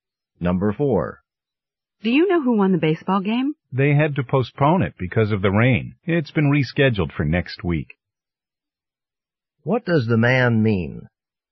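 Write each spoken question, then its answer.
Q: What does the man mean?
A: The game was postponed because of rain and will be played next week.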